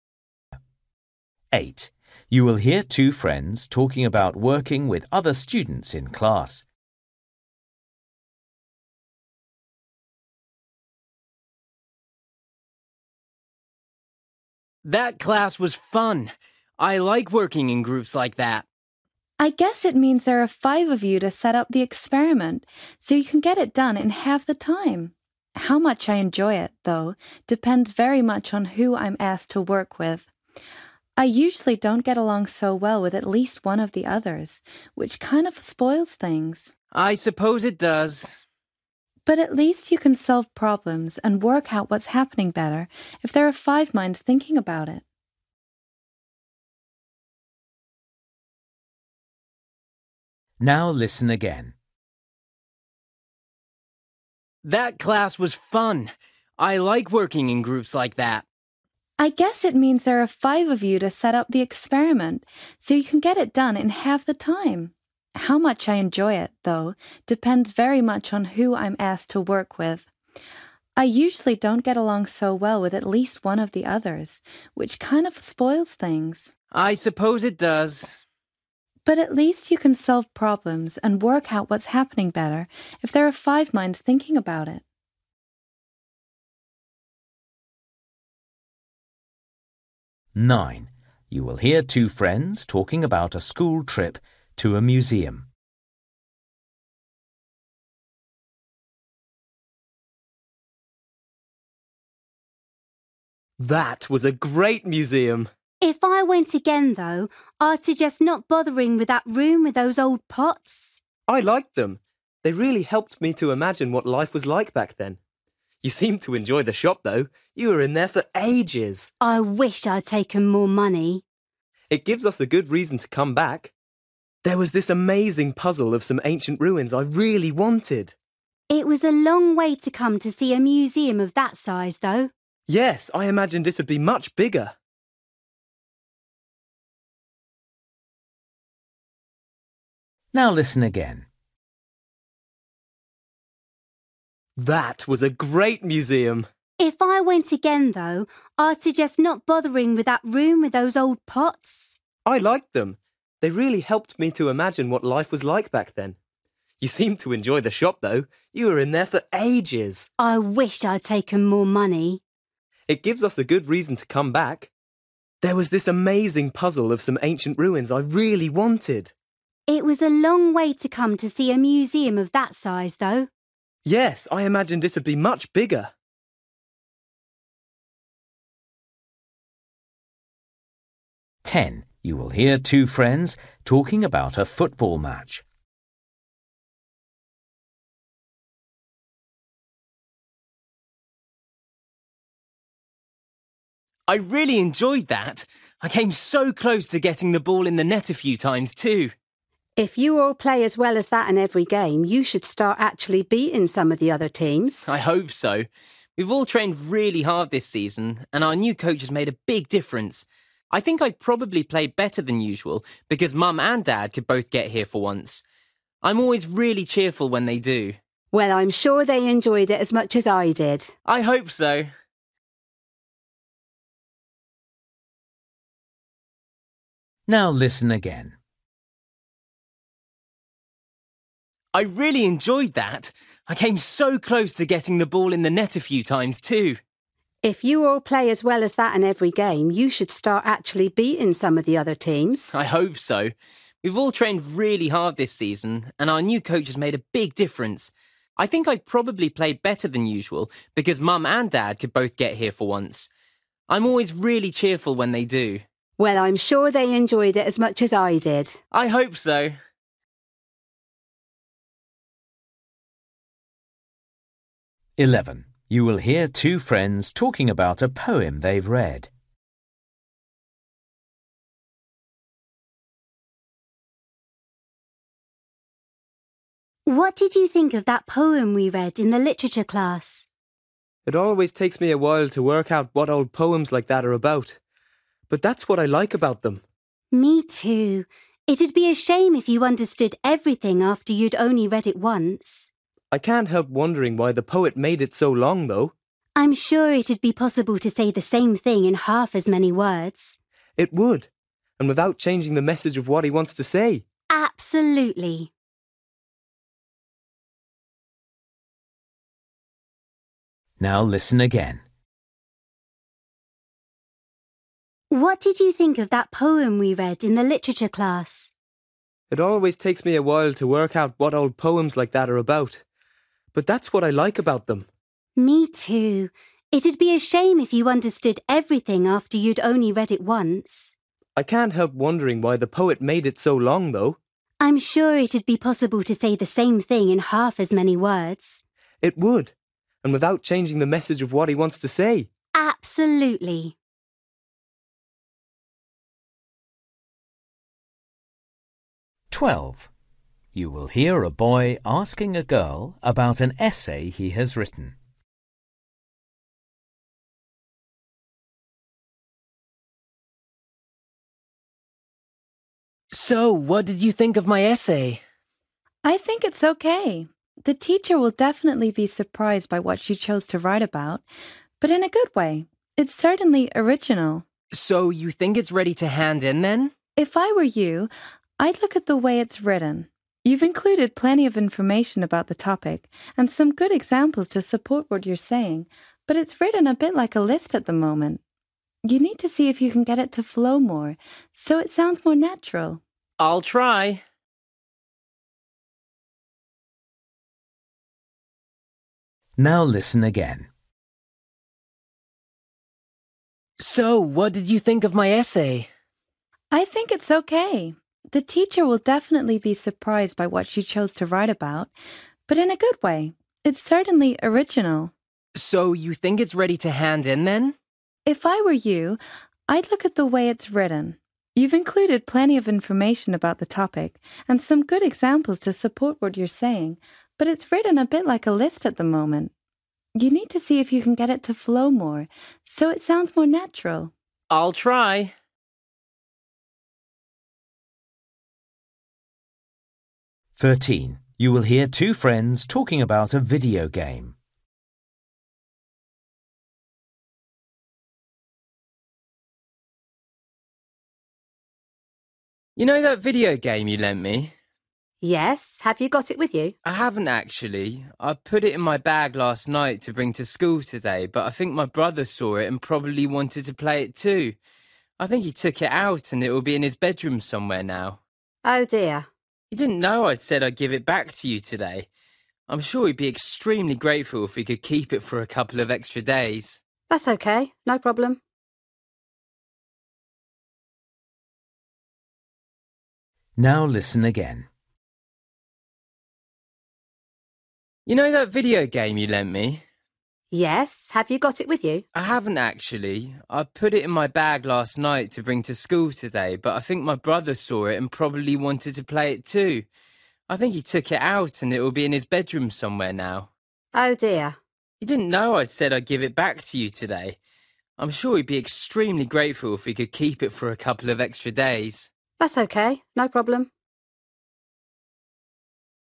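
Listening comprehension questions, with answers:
For each question, choose the correct answer.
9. You will hear two friends talking about a school trip to a museum. The friends agree that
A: the museum was smaller than they expected

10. You will hear two friends talking about a football match. The boy is feeling happy because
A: his parents came to watch him play

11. You will hear two friends talking about a poem they've read. They think the poem would be better if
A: it were shorter

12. You will hear a boy asking a girl about an essay he has written. The girl thinks the boy should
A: improve the way it is written so it flows more naturally

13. You will hear two friends talking about a video game. Why is the boy talking to the girl about the video game?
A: to ask if they can keep it for a couple of extra days

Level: Luyện nghe trình độ B1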